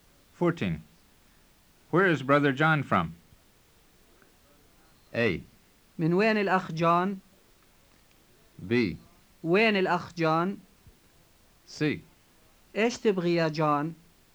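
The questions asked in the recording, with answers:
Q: Where is brother John from?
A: A: من وين الأخ جون؟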